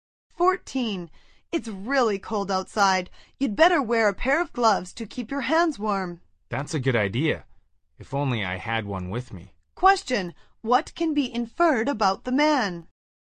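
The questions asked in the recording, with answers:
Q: What can be inferred about the man?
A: He doesn't have gloves with him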